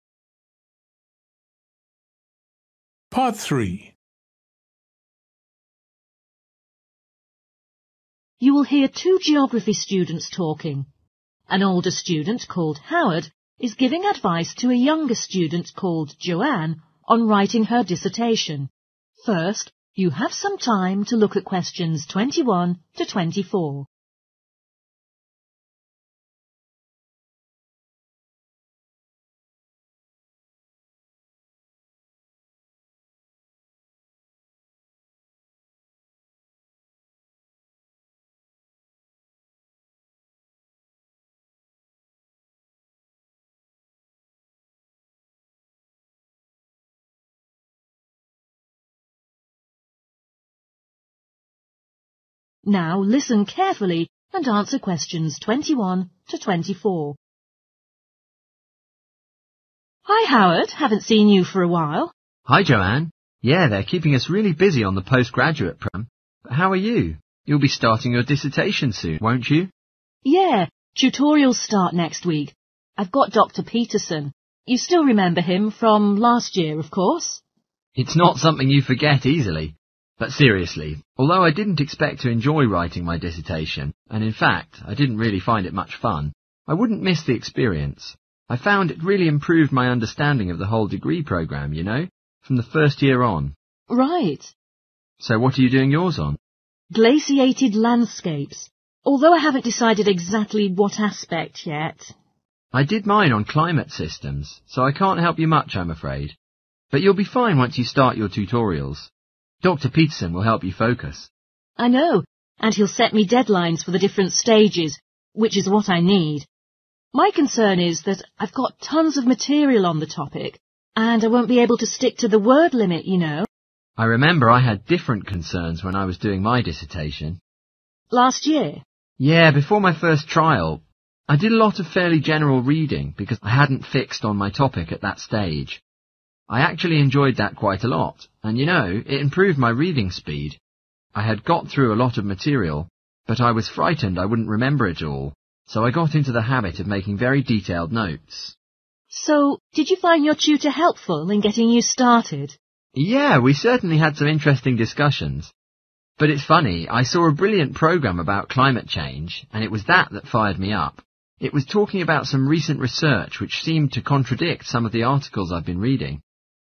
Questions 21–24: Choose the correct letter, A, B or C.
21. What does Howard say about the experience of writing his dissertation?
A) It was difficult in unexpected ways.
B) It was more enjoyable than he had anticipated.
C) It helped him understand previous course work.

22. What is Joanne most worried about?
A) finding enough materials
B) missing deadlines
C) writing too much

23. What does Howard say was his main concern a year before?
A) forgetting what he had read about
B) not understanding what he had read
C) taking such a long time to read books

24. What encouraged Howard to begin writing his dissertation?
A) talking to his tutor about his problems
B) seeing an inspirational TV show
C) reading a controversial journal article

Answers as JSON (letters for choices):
{"21": "C", "22": "C", "23": "A", "24": "B"}

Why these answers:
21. Howard nói rằng mặc dù không thích thú, nhưng trải nghiệm đó giúp anh ấy hiểu rõ hơn về toàn bộ chương trình học.
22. Joanne nói có quá nhiều tài liệu và sợ không giữ được giới hạn số từ.
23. Howard lo sẽ quên những gì mình đã đọc nên phải ghi chú rất chi tiết.
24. Howard nói một chương trình truyền hình hay về biến đổi khí hậu đã khiến anh "fired up".